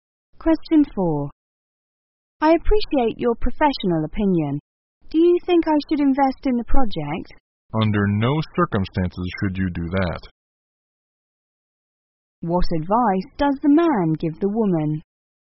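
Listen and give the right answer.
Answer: Not to invest in the project.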